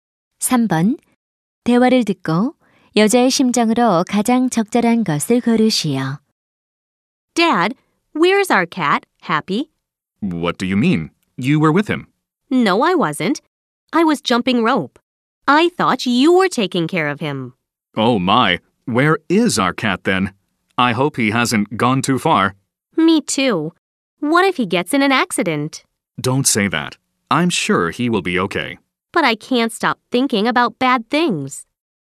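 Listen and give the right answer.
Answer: 걱정스러움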